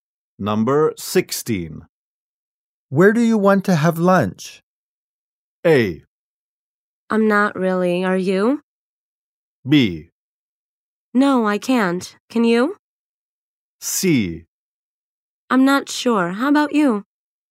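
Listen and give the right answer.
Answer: C: I'm not sure. How about you?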